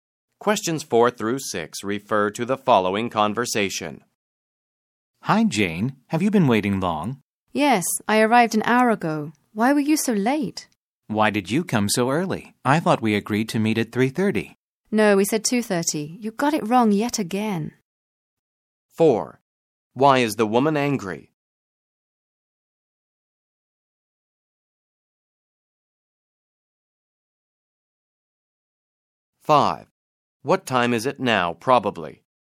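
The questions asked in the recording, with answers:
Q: Why is the woman angry?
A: The man arrived an hour late

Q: What time is it now, probably?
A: 3:30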